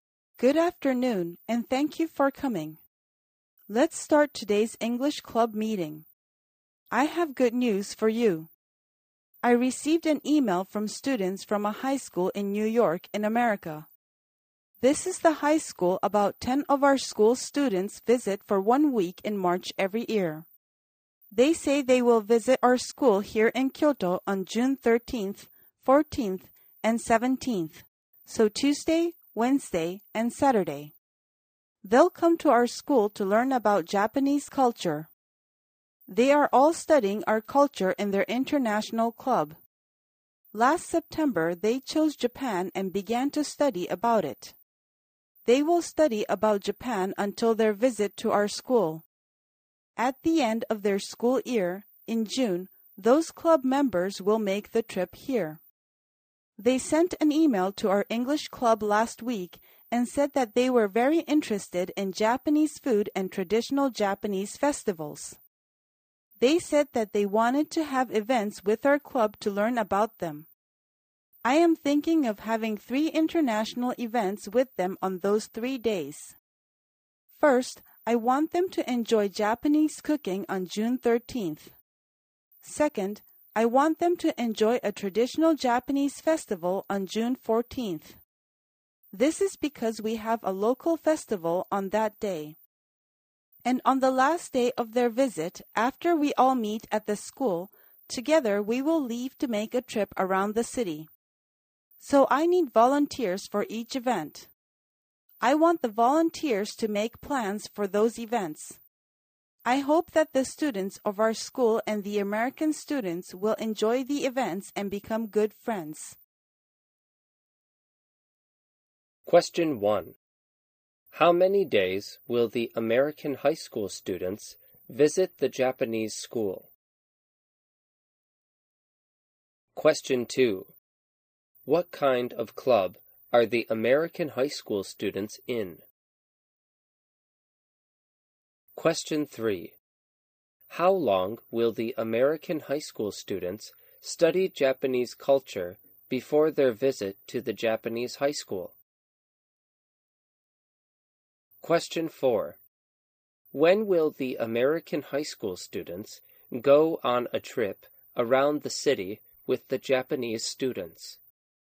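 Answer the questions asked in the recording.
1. Three days
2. An international club
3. From last September until June (about nine months)
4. On June 17th (Saturday), the last day of their visit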